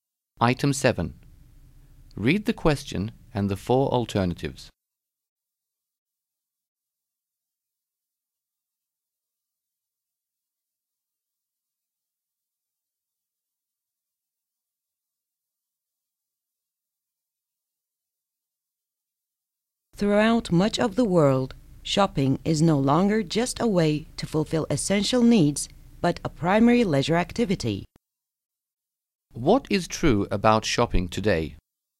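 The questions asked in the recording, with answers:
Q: What is true about shopping today?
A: In much of the world it is a main leisure activity, not just a way to meet needs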